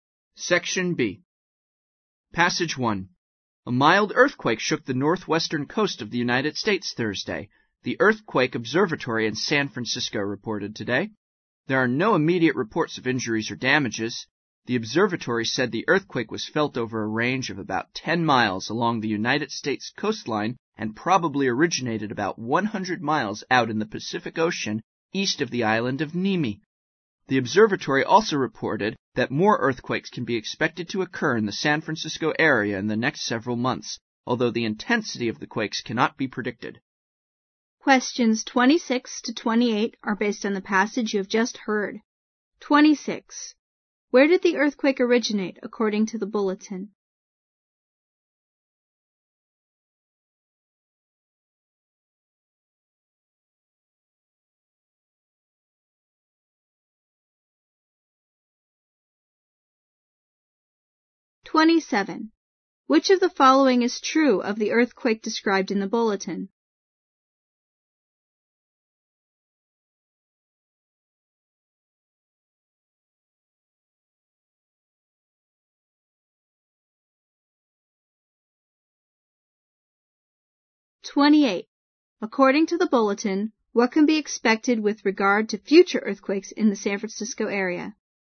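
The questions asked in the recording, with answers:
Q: Where did the earthquake originate, according to the bulletin?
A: About 100 miles out in the Pacific Ocean

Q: According to the bulletin, what can be expected with regard to future earthquakes in the San Francisco area?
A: More earthquakes in the next several months, of unpredictable intensity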